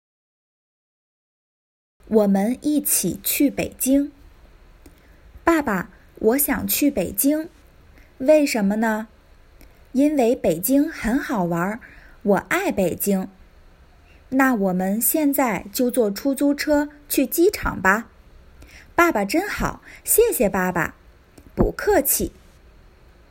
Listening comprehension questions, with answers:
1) 为什么儿子想去北京?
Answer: 因为北京很好玩儿

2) 他们怎么去机场?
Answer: 坐出租车

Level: complete beginners